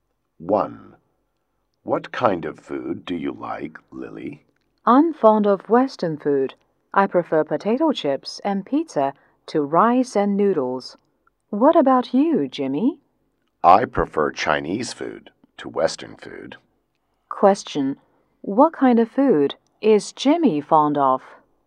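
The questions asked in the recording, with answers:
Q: What kind of food is Jimmy fond of?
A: Chinese food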